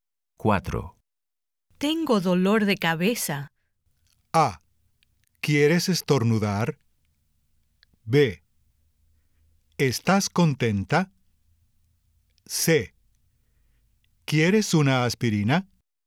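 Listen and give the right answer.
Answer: C: ¿Quieres una aspirina?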